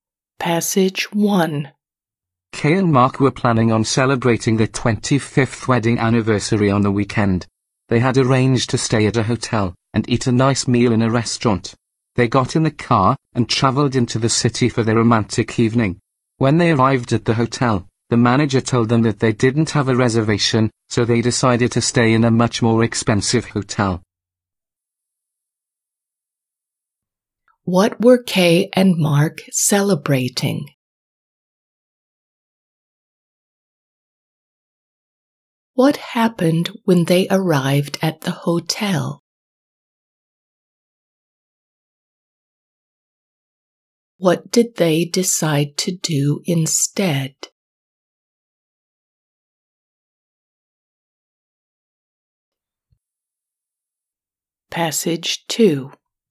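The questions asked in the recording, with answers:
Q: What were Kay and Mark celebrating?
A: Their 25th wedding anniversary

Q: What happened when they arrived at the hotel?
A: They didn't have a reservation

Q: What did they decide to do instead?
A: Stay in a more expensive hotel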